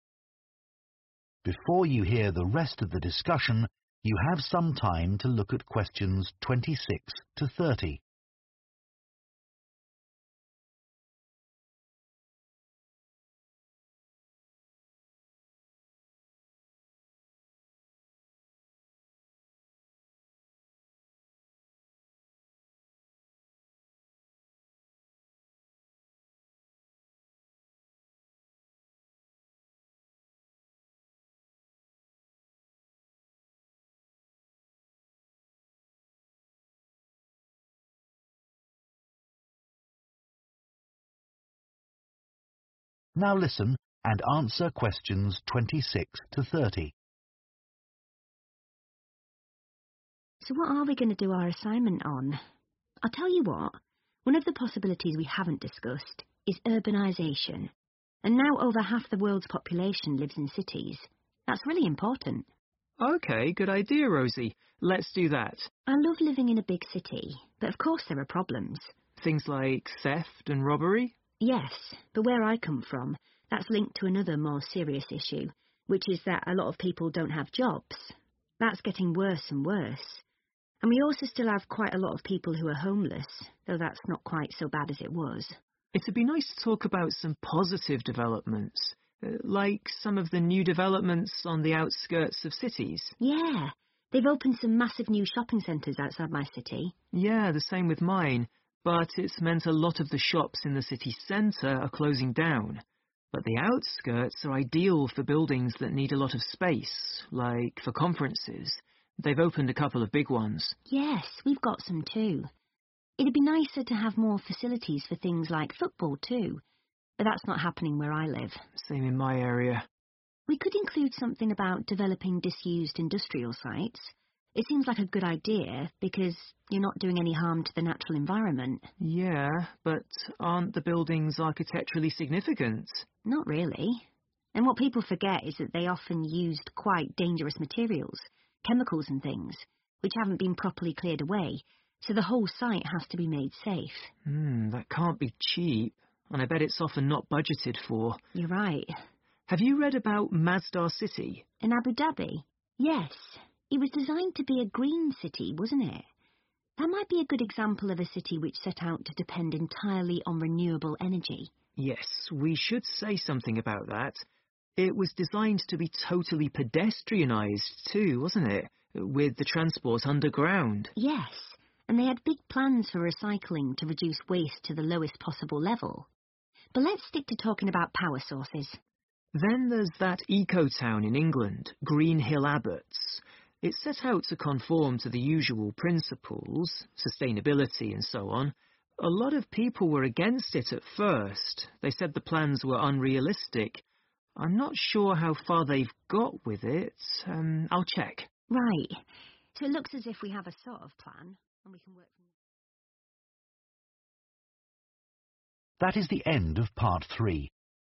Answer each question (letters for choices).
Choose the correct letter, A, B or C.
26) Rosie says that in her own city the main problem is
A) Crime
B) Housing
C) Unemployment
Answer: C

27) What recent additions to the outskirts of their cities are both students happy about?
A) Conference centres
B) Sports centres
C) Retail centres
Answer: A

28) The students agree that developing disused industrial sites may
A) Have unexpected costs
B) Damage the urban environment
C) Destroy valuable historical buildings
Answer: A

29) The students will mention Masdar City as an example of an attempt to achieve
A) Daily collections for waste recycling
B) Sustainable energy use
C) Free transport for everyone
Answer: B

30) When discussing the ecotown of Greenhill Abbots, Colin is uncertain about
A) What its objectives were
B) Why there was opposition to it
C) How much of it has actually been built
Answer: C

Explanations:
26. The correct answer is C, unemployment, because Rosie mentions that in her city, many people don't have jobs and that this problem is getting worse. She links issues like theft to the fact that people lack employment, indicating that unemployment is a significant concern in her area.
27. The correct answer is A because in the discussion, Colin mentions that the outskirts are suitable for large buildings, and he specifically states that they have opened 'a couple of big ones' for conferences. This shows that both Rosie and Colin are happy about the new conference centers.
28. The correct answer is 'A' because Colin and Rosie talk about how developing old industrial sites can be expensive. They mention that these sites often have dangerous materials that need to be cleaned up, and this cleaning process is not cheap. This implies that there can be unexpected costs involved in the development.
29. The correct answer is 'Sustainable energy use' because in the transcript, Rosie and Colin discuss how Masdar City was designed to depend entirely on renewable energy. This shows that the city is trying to use energy in a way that does not harm the environment, which is the definition of sustainable energy.
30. The correct answer is C because Colin mentions that he is not sure how far they've got with the ecotown Greenhill Abbotts. This means he does not know how much has been built so far, showing his uncertainty about the current state of the project.

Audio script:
COLIN We could focus on poverty. That's something that's a global problem.
ROSIE The trouble is, Dr Lee was saying, that you have to be careful with some of the figures relating to poverty. They're sometimes deliberately manipulated.
COLIN You mean the information gets changed for political reasons?
ROSIE That sort of thing, yes.
ROSIE So what are we going to do our assignment on? I'll tell you what. One of the possibilities we have discussed is urbanisation and now over half the world population lives in cities. That really important
COLIN OK good idea Rosie Let do that
ROSIE I love living in a big city but of course there are problems
COLIN Things like theft and robbery?
ROSIE Yes, but where I come from, that's linked to another more serious issue, which is that a lot of people don't have jobs. That's getting worse and worse. And we also still have quite a lot of people who are homeless, though that's not quite so bad as it was.
COLIN It would be nice to talk about some positive developments, like some of the new developments on the outskirts of cities.
ROSIE Yeah, they've opened some massive new shopping centres outside my city.
COLIN Yeah, the same with mine, but it means a lot of the shops in the city centre are closing down. But the outskirts are ideal for buildings that need a lot of space, like for conferences. They've opened a couple of big ones.
ROSIE Yes, we've got some too. It'd be nicer to have more facilities for things like football too, but that's not happening where I live.
COLIN Same in my area.
ROSIE We could include something about developing disused industrial sites. It seems like a good idea because you're not doing any harm to the natural environment.
COLIN Yeah, but aren't the buildings architecturally significant?
ROSIE Not really. And what people forget is that they often used quite dangerous materials, chemicals and things, which haven't been properly cleared away, so the whole site has to be made safe.
COLIN Hmm, that can't be cheap. And I bet it's often not budgeted for.
ROSIE You're right.
COLIN Have you read about Masdar City?
ROSIE In Abu Dhabi? Yes. It was designed to be a green city, wasn't it? That might be a good example of a city which set out to depend entirely on renewable energy.
We should say something about that. It was designed to be totally pedestrianised too wasn't it with the transport underground
ROSIE Yes and they had big plans for recycling to reduce waste to the lowest possible level But let's stick to talking about power sources.
COLIN Then there's that ecotown in England, Greenhill Abbotts. It set out to conform to the usual principles, sustainability and so on. A lot of people were against it at first. They said the plans were unrealistic. I'm not sure how far they've got with it. I'll check.
ROSIE Right. So it looks as if we have a sort of plan.